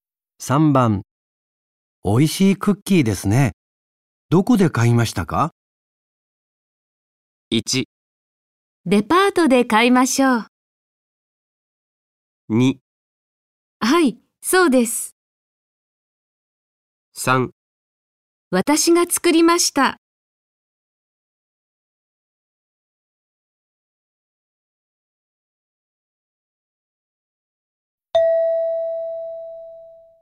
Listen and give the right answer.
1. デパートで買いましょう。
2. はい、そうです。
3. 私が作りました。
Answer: 3. 私が作りました。

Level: N5 Listening · Test 1